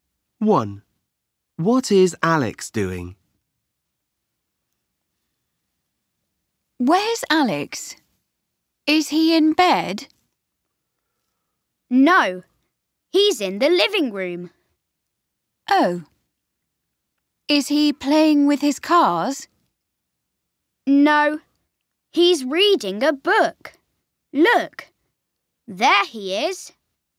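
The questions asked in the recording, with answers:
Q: What is Alex doing?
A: Reading a book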